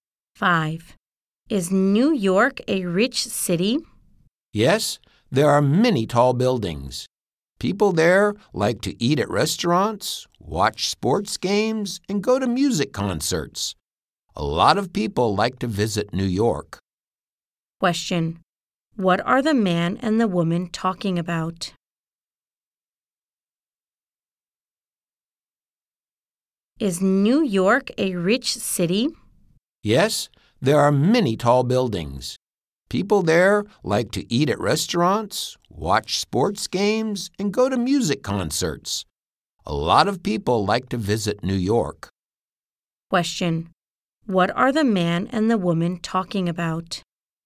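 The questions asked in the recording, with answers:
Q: Question, what are the man and the woman talking about?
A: New York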